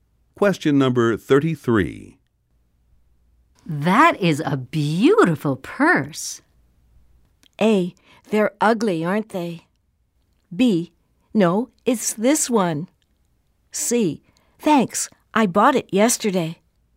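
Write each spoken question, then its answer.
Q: That is a beautiful purse.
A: C: Thanks, I bought it yesterday.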